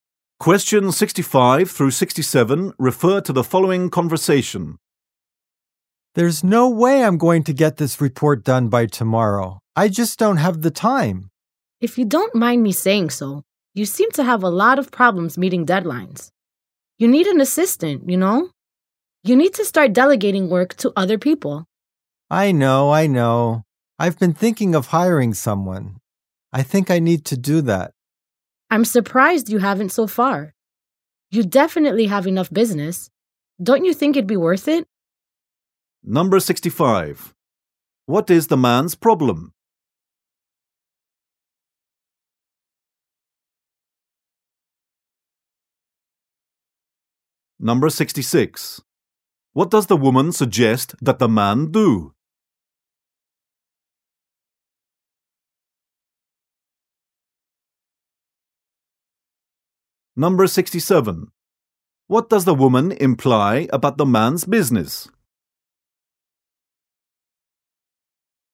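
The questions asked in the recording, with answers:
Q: What is the man's problem?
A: He can't finish a report in time

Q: What does the woman suggest that the man do?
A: Hire an assistant

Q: What does the woman imply about the man's business?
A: It has plenty of work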